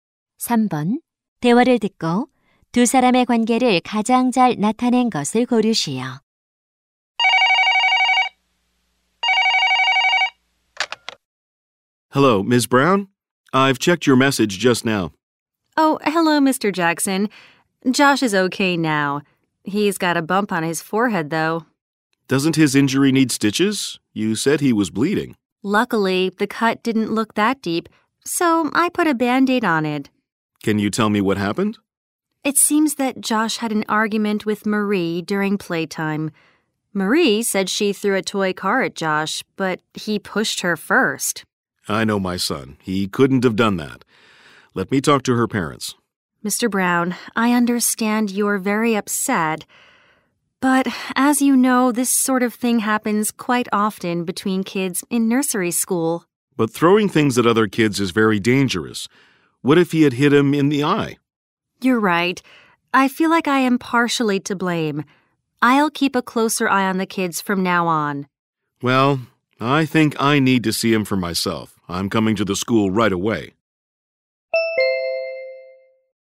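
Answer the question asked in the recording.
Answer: 학부모 - 어린이집 교사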